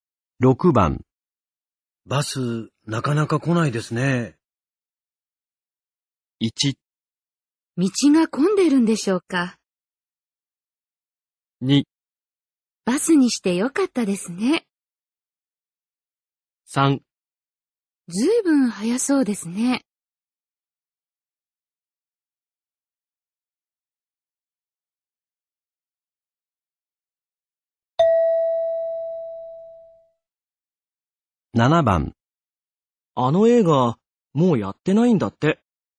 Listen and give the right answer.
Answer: 1

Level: N3 Listening · Test 15